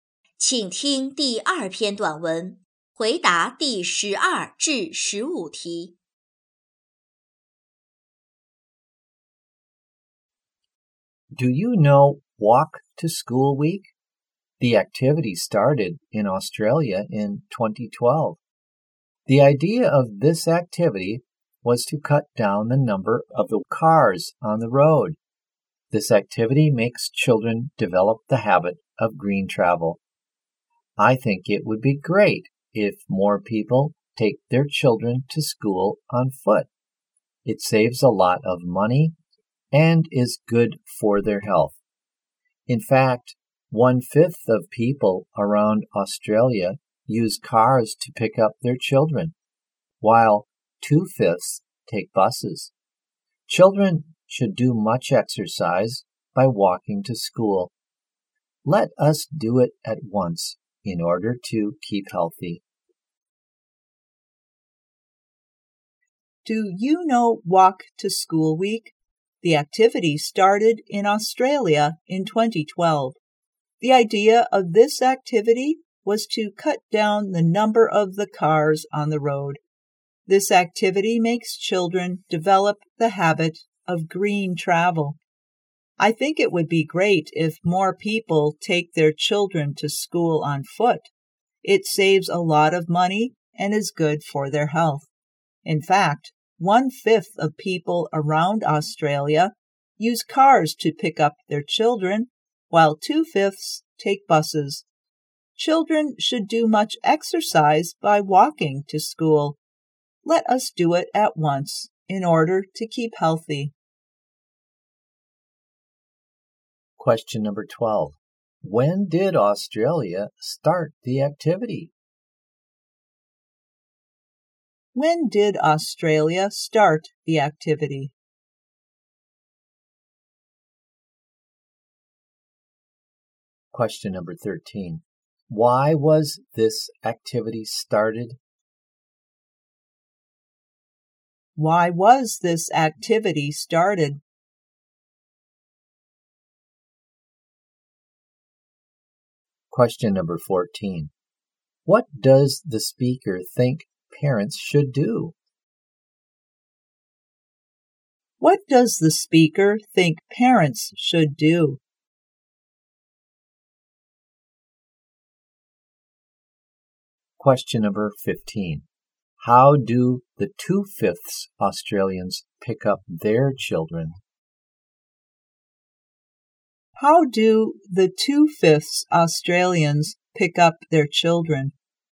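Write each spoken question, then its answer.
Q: When did Australia start the activity?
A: In 2012

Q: Why was this activity started?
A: To cut down the number of cars on the road

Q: What does the speaker think parents should do?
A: Take their children to school on foot

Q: How do the 2/5 Australians pick up their children?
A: By bus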